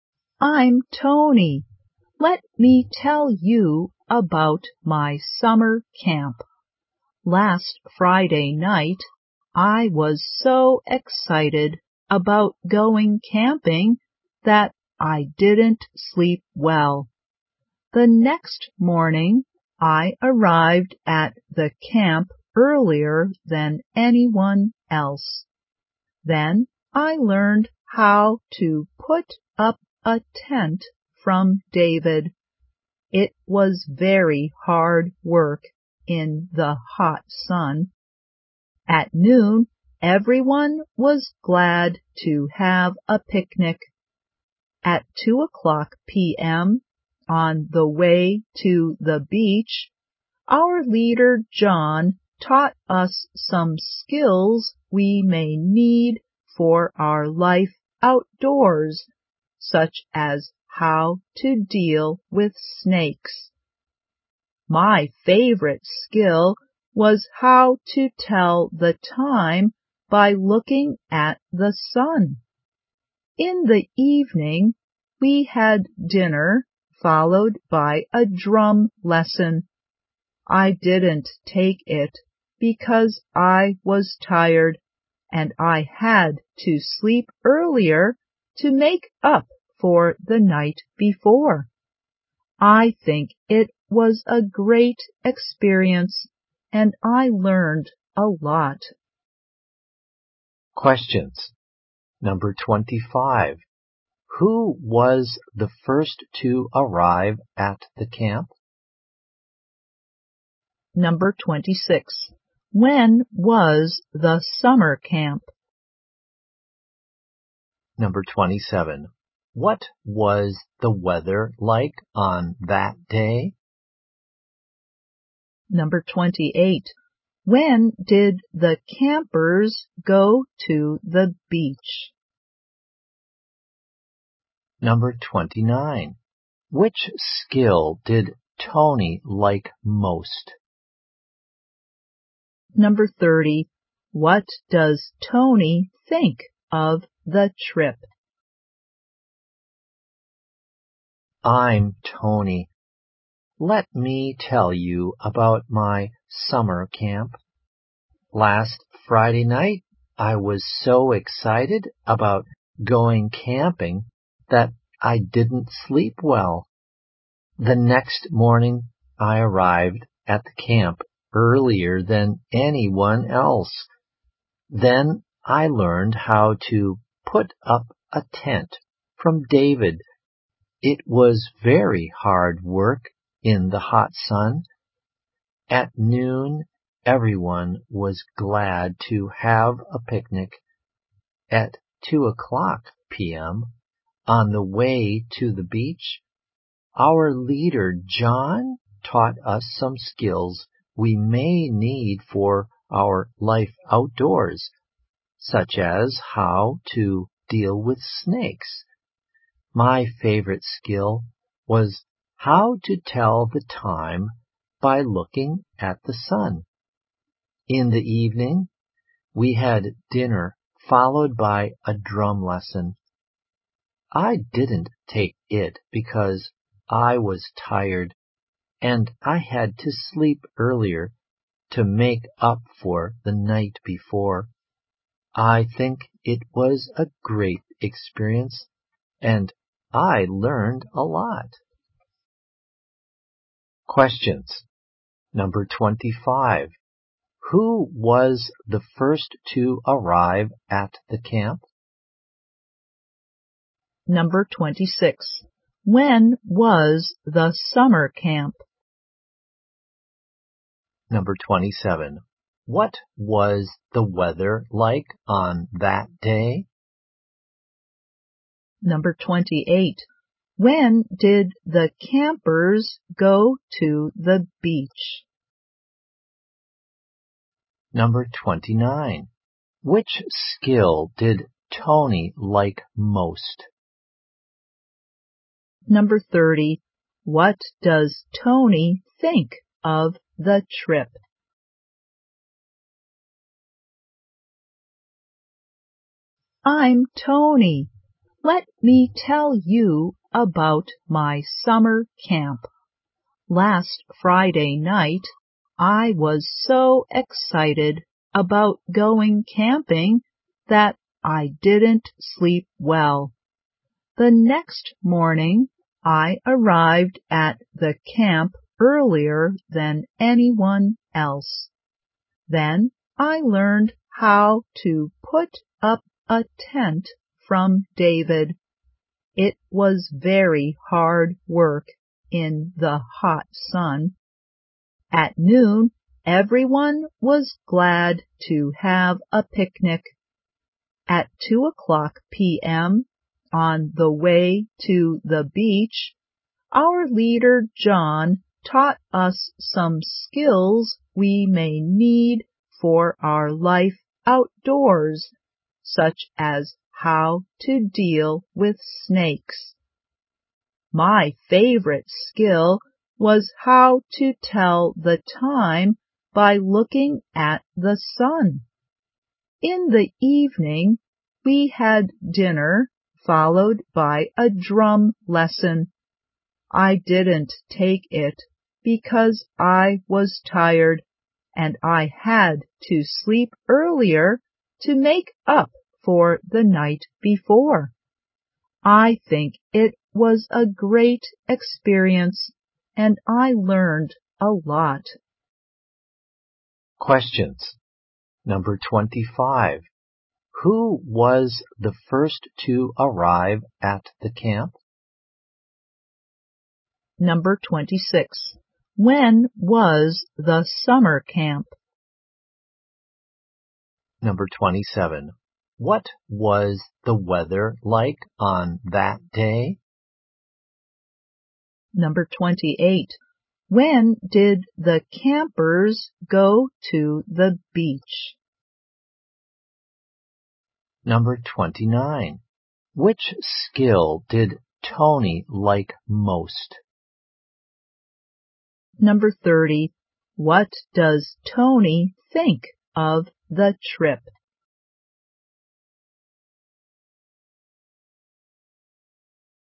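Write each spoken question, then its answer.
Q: Who was the first to arrive at the camp?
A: Tony.

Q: What was the weather like on that day?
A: Hot and sunny.

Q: When did the campers go to the beach?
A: At 2 p.m.

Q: Which skill did Tony like most?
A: How to tell the time by looking at the sun.

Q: What does Tony think of the trip?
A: It was a great experience and he learned a lot.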